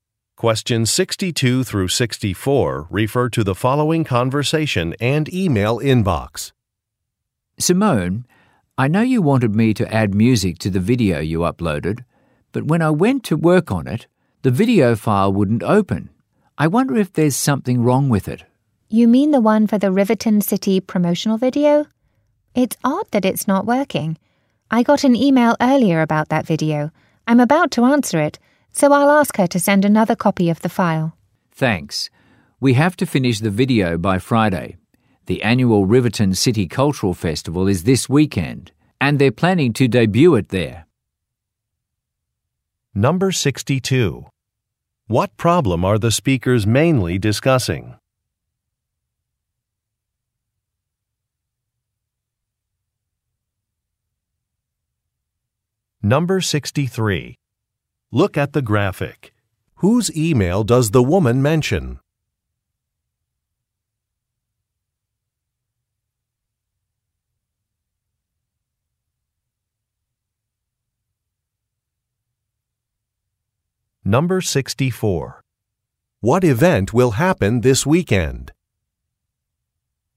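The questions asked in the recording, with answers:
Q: What problem are the speakers mainly discussing?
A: A video file won't open

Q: What event will happen this weekend?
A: The annual Riverton City Cultural Festival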